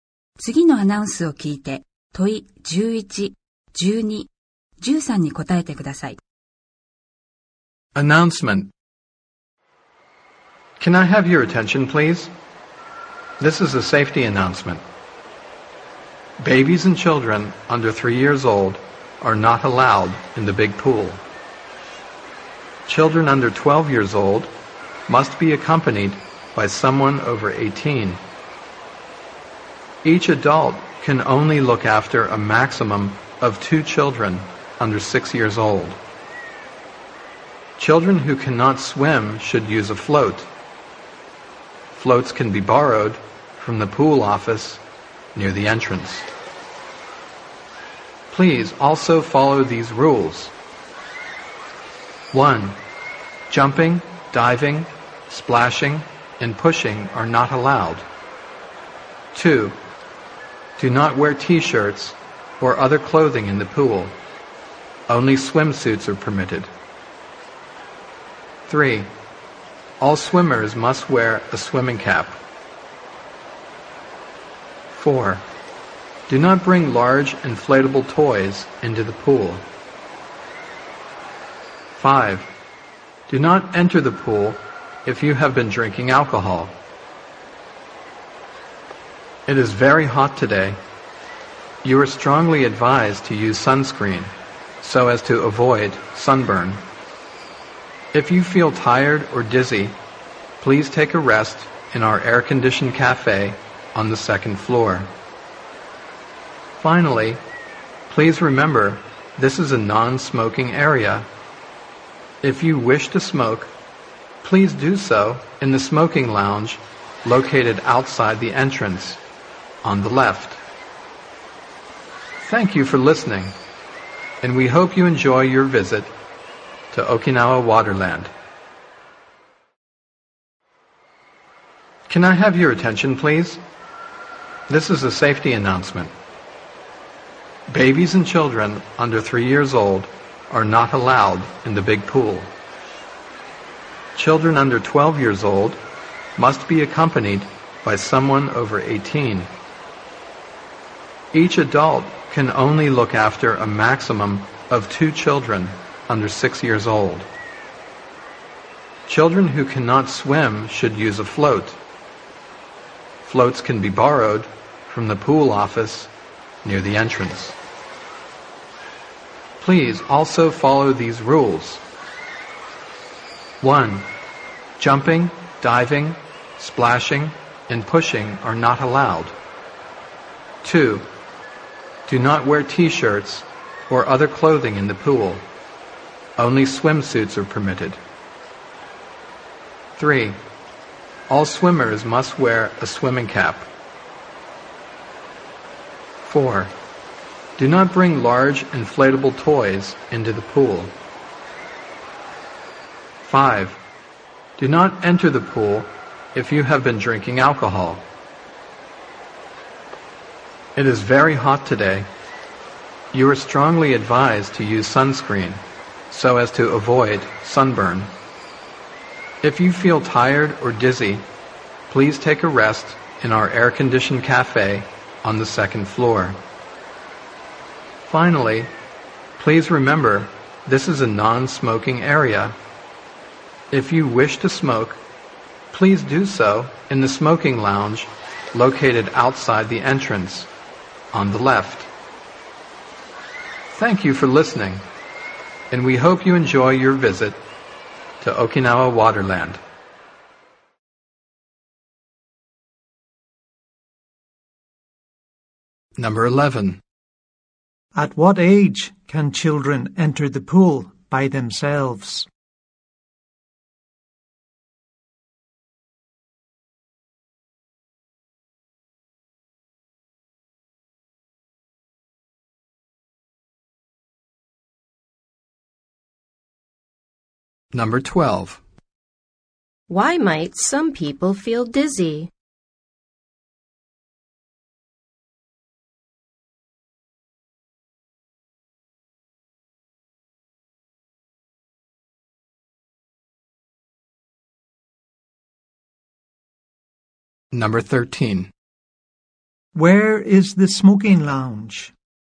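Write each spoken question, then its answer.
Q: At what age can children enter the pool by themselves?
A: 12 years old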